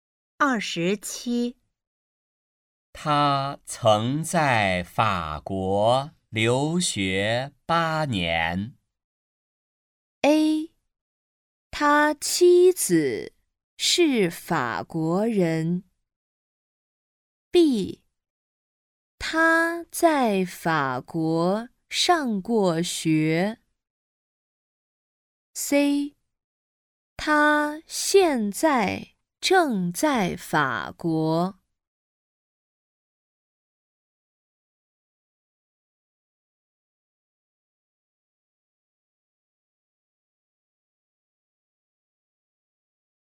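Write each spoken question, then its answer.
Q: 他曾在法国留学八年。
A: B: 他在法国上过学。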